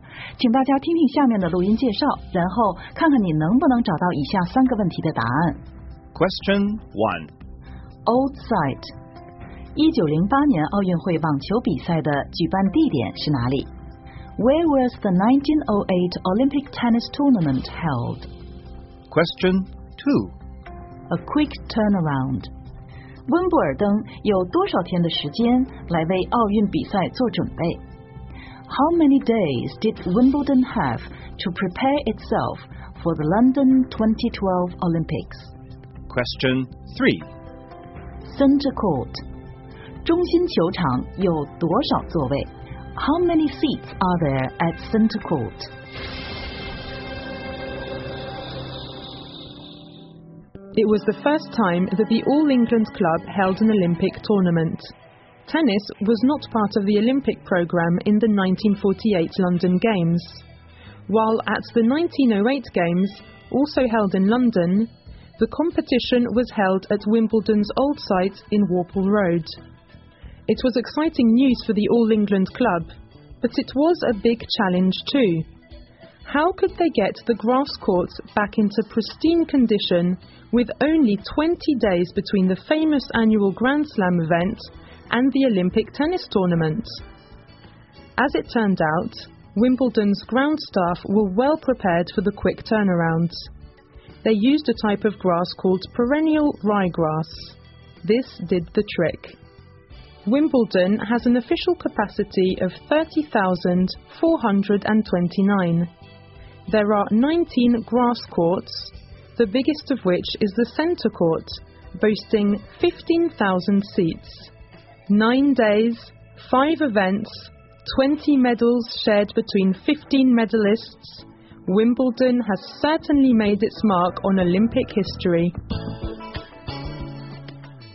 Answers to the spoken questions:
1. The competition was held at Wimbledon's old site in Warple Road.
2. 温布尔登只有20天为2012年伦敦奥运做准备。
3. 中心球场一共有15,000个座位。